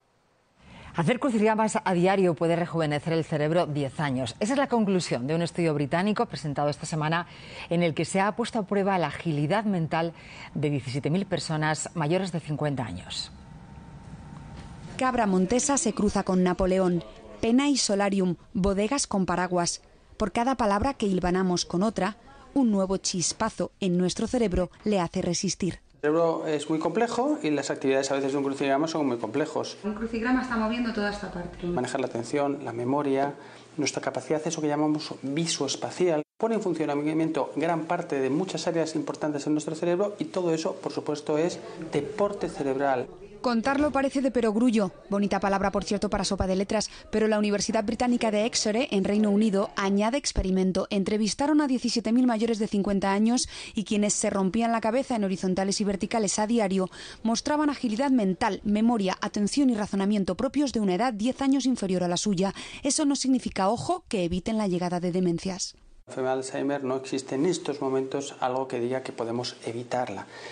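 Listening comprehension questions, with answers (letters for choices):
Escucha e indica las frases correctas teniendo en cuenta la información del reportaje.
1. La universidad británica de Exeter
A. investigó las capacidades mentales de 17.000 personas.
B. investigó las capacidades mentales de 17.000 personas aficionadas a los crucigramas.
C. investigó los efectos de los crucigramas en un grupo de personas menores de 50 años y en otro de mayores de 50.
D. investigó 17.000 crucigramas y sus efectos en el cerebro.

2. Las personas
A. que hacen cada día crucigramas tienen una mayor agilidad mental que las que no lo hacen nunca.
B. que regularmente hacen crucigramas tienen mejor memoria.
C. de más de 50 años que cada día hacen crucigramas tienen las capacidades mentales similares a las de personas 10 años más jóvenes.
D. que hacen más de 50 crucigramas al año muestran más agilidad mental.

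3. Hacer crucigramas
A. puede evitar la enfermedad de Alzheimer.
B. puede evitar la enfermedad de Alzheimer y demencias.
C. puede evitar cierto tipo de demencias.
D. no puede evitar demencias ni el Alzheimer.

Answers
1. A
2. C
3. D

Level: B2级别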